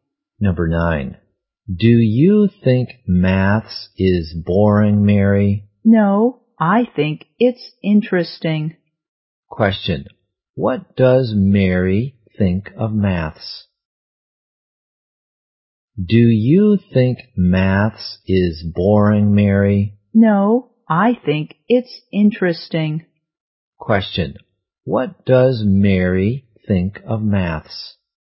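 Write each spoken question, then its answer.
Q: What does Mary think of maths?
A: Interesting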